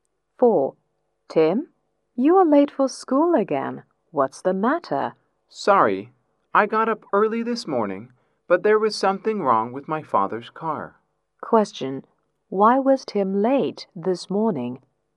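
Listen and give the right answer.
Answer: There was something wrong with his father's car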